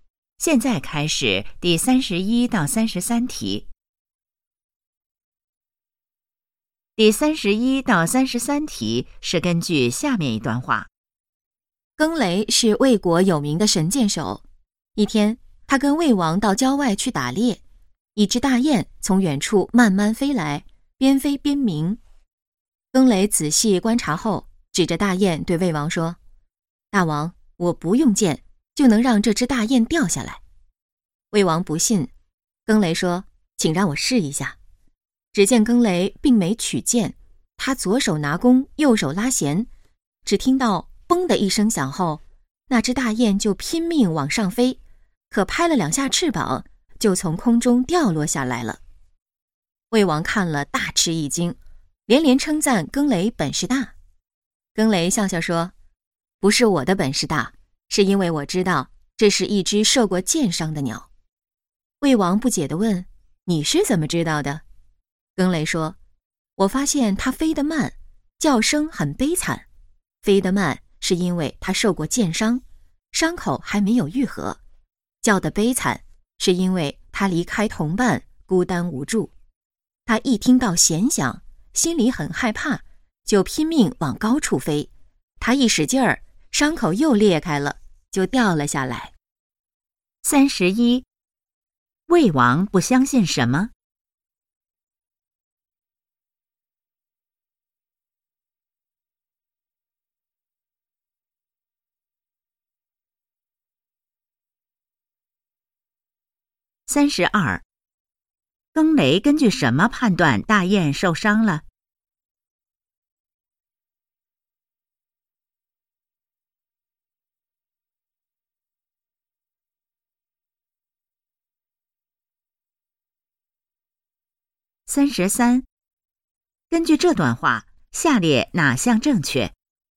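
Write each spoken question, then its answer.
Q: 魏王不相信什么?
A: 更雷不用箭就能让大雁掉下来

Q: 更雷根据什么判断大雁受伤了?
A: 飞得慢,叫声悲惨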